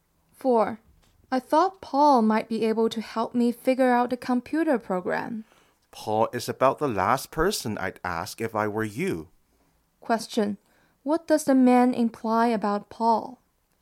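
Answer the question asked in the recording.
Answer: Paul is unlikely to be able to help.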